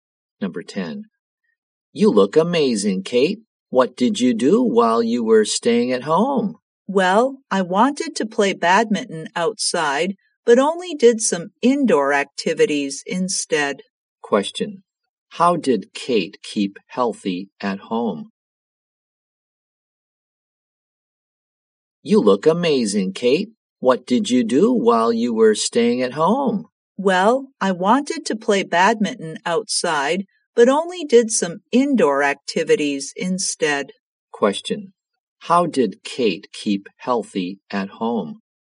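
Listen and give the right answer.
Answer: By doing indoor activities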